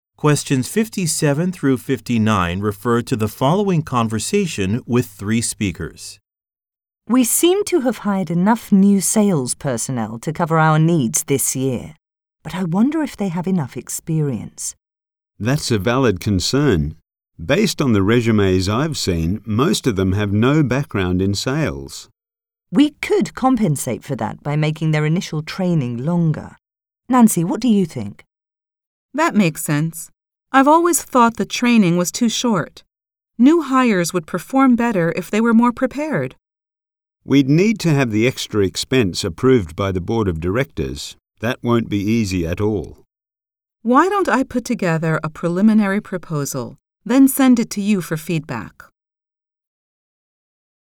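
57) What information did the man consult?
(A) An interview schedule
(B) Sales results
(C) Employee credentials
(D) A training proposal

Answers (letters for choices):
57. C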